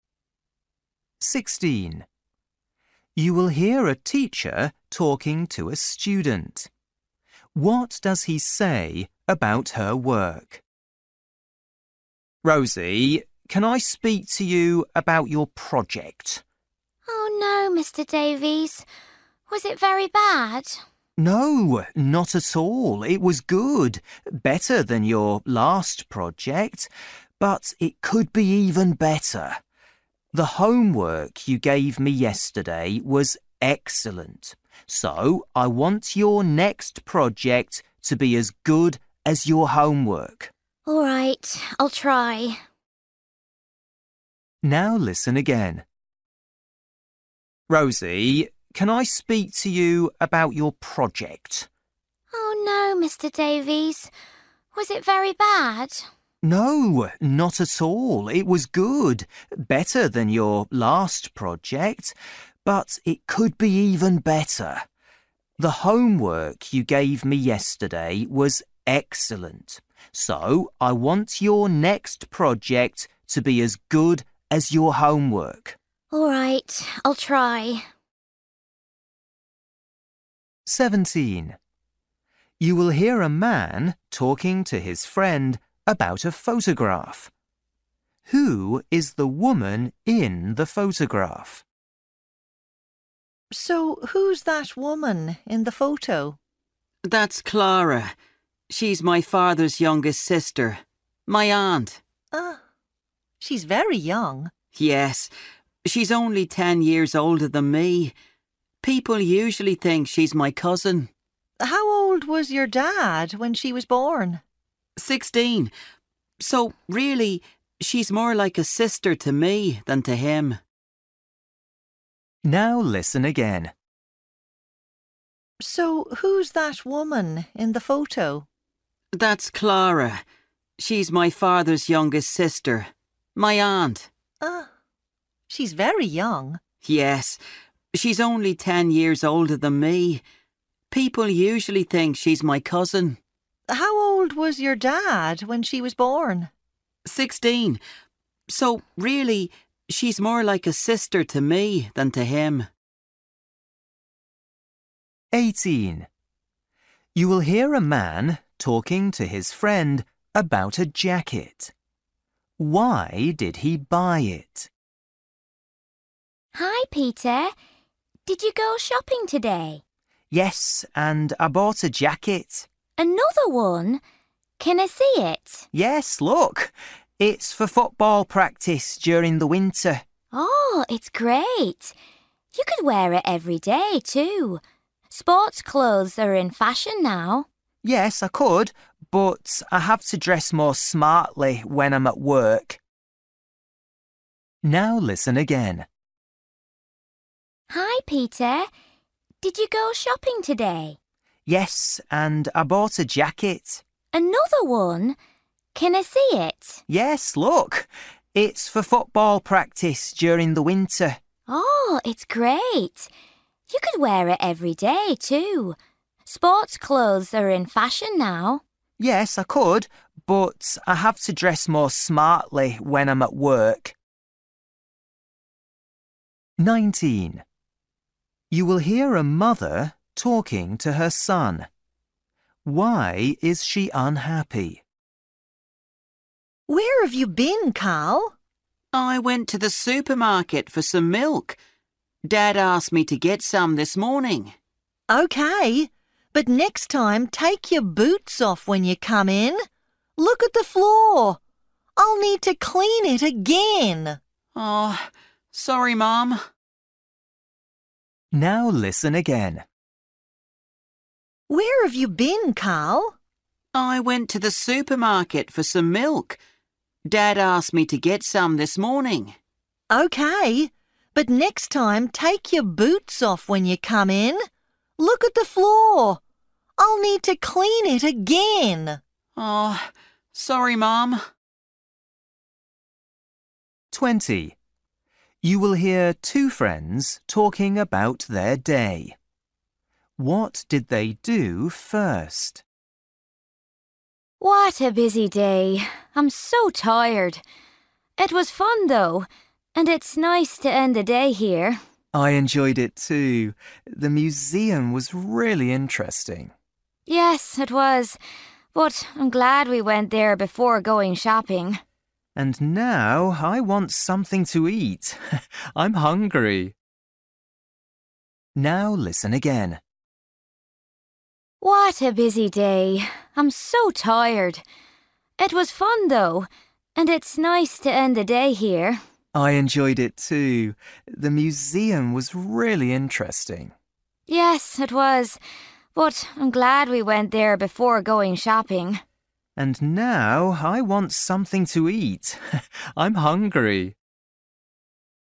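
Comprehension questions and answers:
For each question, choose the correct answer.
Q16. You will hear a teacher talking to a student. What does he say about her work?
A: Her project was good, better than her last one, but it could be even better.

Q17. You will hear a man talking about to his friend about a photograph. Who is the woman in the photograph?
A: His aunt

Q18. You will hear a man talking to his friend about a jacket. Why did he buy it?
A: For football practice during the winter

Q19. You will hear a mother talking to her son. Why is she unhappy?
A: He didn't take his boots off and dirtied the floor

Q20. You will hear two friends talking about their day. What did they do first?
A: They went to the museum

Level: Luyện nghe trình độ A2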